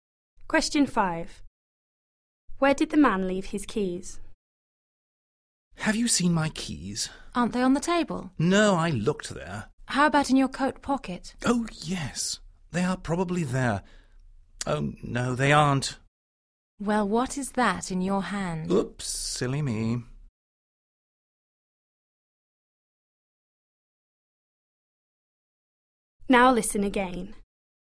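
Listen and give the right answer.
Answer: In his hand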